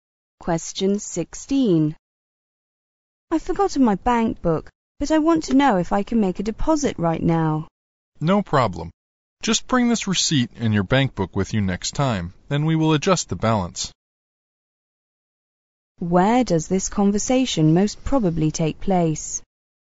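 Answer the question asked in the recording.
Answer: At a bank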